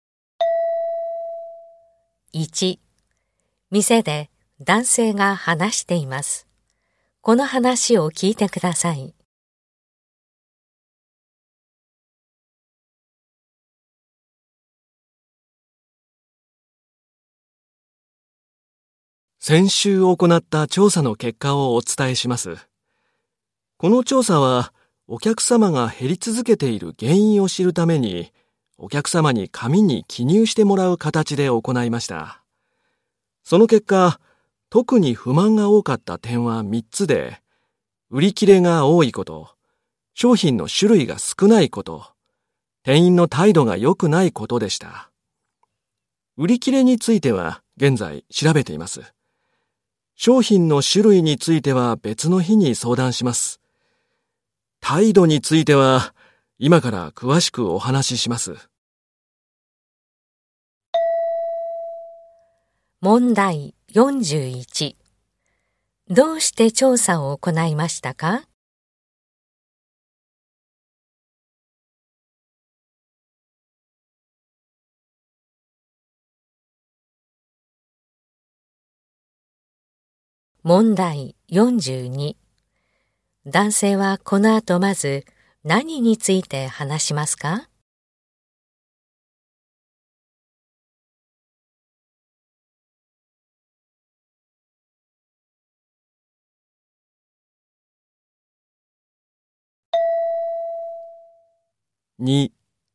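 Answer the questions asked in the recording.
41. お客様が減り続けている原因を知るため
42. 店員の態度について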